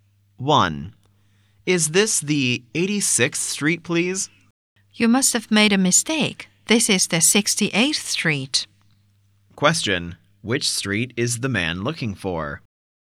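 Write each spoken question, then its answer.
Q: Which street is the man looking for?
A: 86th Street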